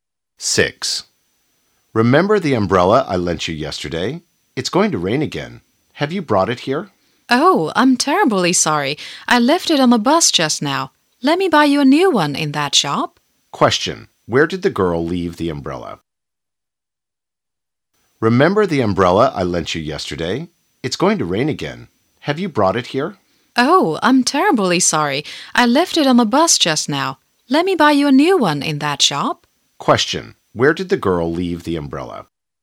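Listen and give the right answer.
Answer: On the bus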